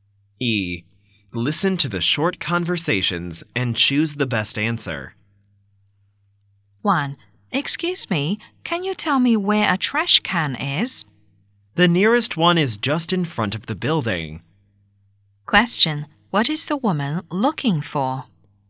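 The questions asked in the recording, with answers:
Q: What is the woman looking for?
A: A trash can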